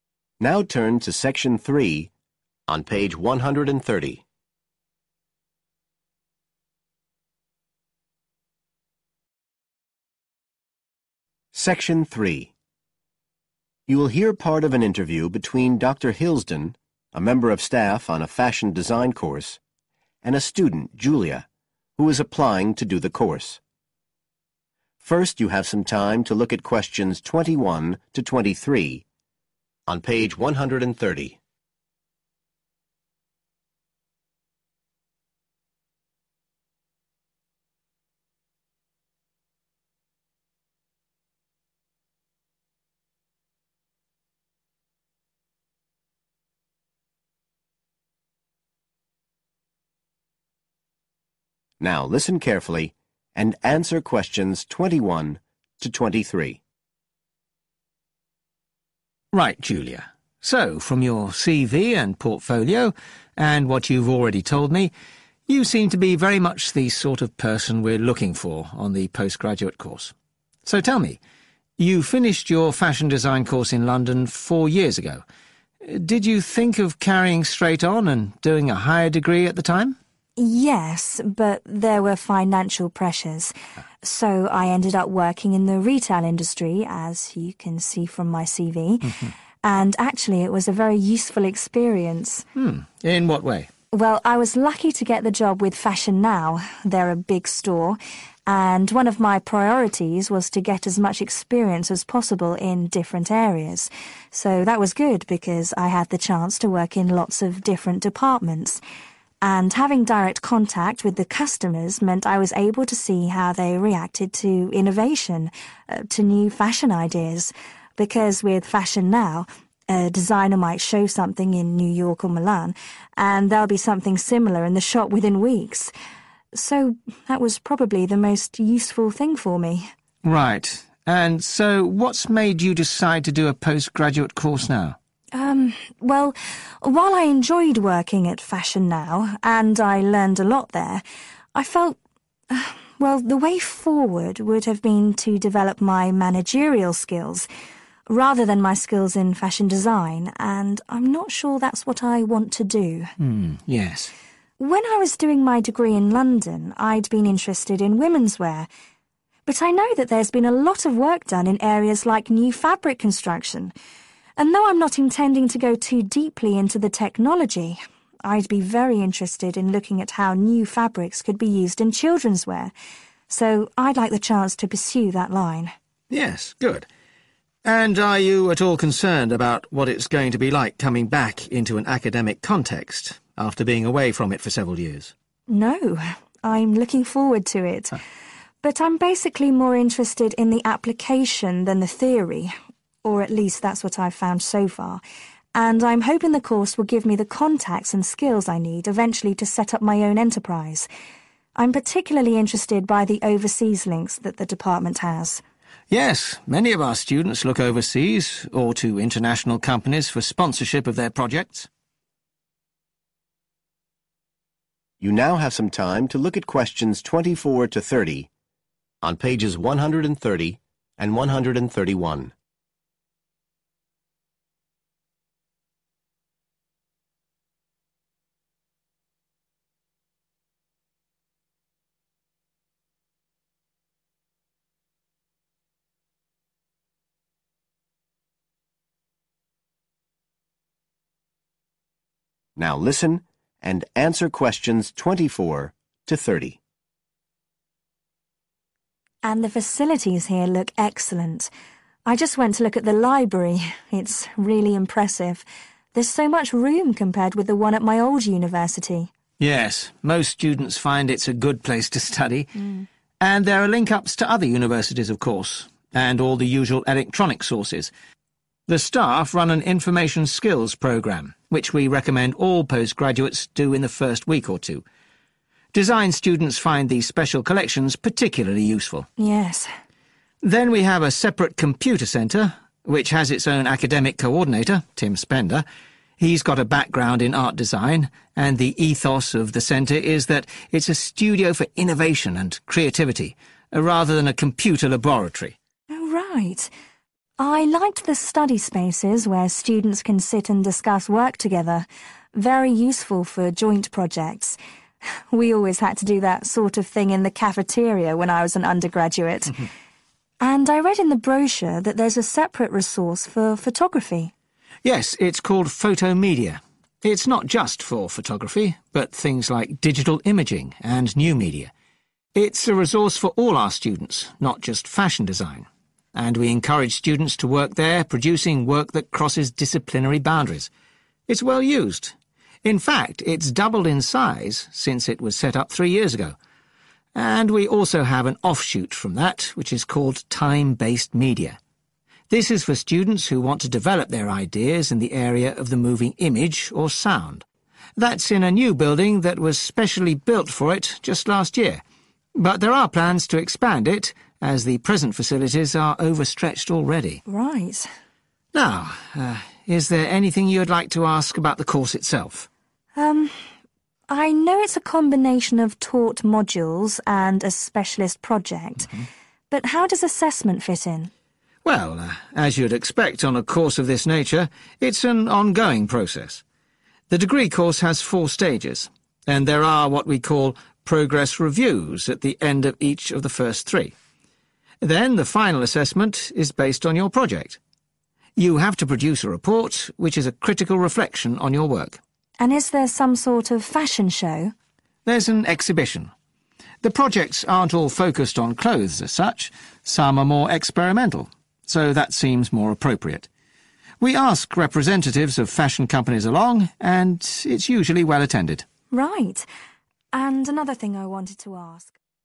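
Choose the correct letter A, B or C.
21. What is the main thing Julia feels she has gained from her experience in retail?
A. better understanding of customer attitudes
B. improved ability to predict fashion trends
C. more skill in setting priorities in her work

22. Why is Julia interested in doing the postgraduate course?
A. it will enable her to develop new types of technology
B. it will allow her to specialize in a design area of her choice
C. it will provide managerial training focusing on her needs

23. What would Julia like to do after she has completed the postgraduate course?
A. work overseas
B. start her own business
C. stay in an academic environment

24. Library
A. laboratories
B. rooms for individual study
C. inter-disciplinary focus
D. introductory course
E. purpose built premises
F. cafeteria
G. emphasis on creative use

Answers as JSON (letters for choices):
{"21": "A", "22": "B", "23": "B", "24": "D"}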